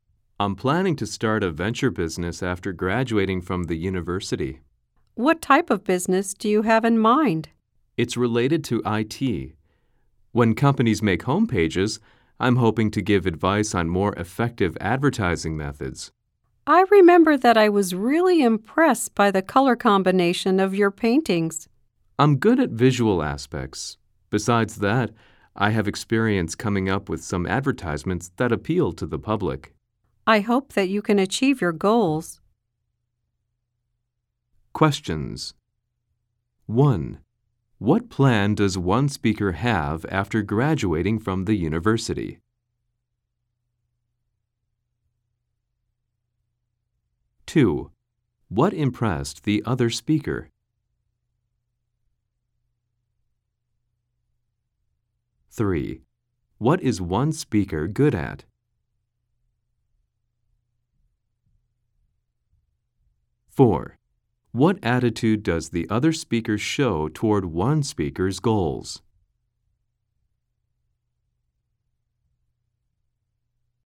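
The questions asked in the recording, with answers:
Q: What plan does one speaker have after graduating from the university?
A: To start an IT venture business advising companies on effective advertising for their homepages

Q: What impressed the other speaker?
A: The color combination of the speaker's paintings

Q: What is one speaker good at?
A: Visual aspects

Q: What attitude does the other speaker show toward one speaker's goals?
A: Supportive; hopes the speaker achieves them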